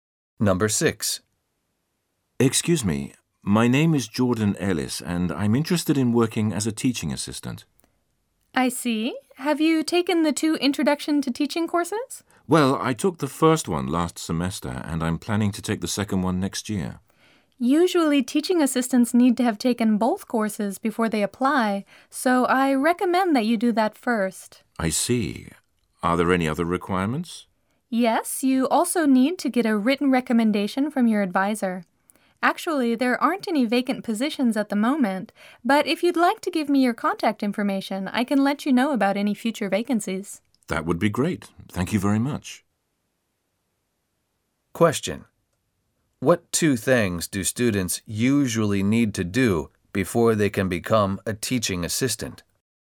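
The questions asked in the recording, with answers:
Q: What two things do students usually need to do before they can become a teaching assistant?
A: Take both Introduction to Teaching courses and get a written recommendation from their advisor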